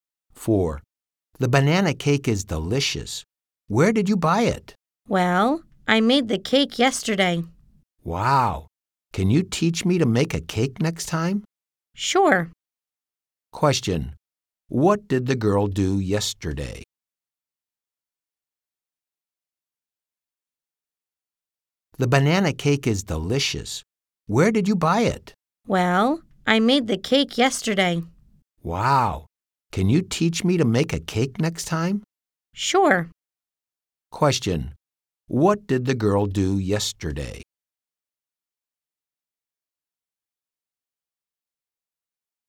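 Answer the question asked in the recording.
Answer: She made a banana cake.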